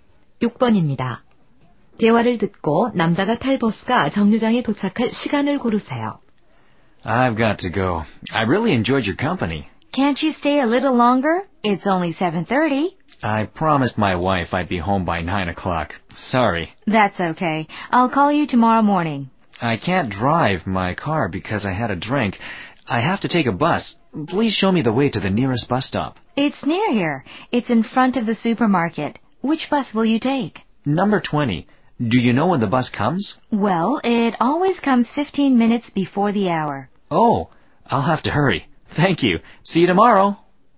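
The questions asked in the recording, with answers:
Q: 대화를 듣고 남자가 탈 버스가 정류장에 도착할 시간을 고르세요.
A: 7시 45분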